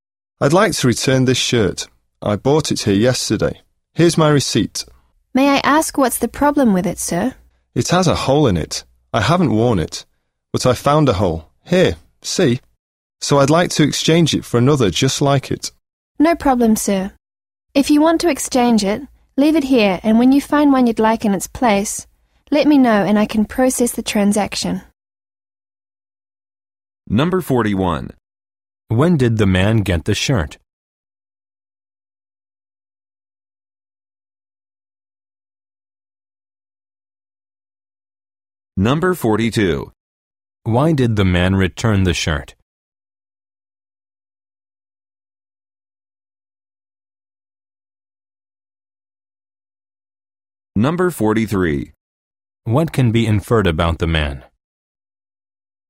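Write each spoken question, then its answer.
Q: When did the man get the shirt?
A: Yesterday

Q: Why did the man return the shirt?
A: It has a hole in it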